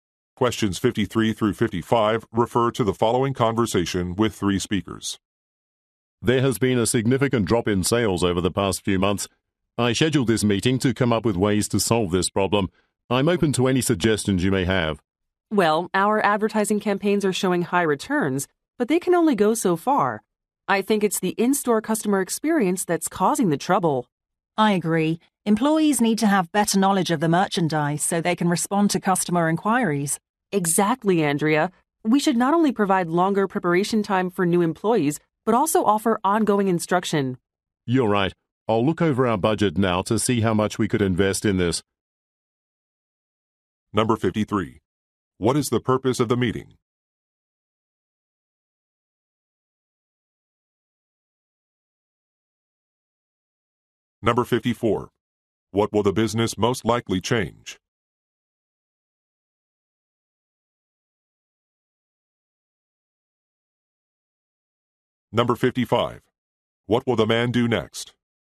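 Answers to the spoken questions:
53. To address falling sales
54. Its employee training
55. Review the budget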